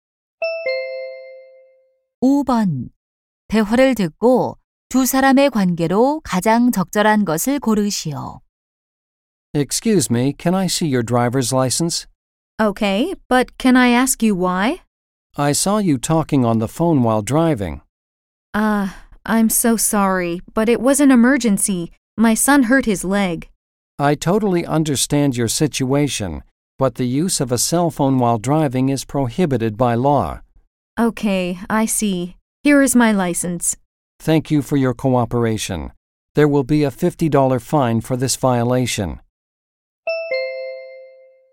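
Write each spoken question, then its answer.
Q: 대화를 듣고 두 사람의 관계로 가장 적절한 것을 고르시오.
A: 경찰관 - 운전자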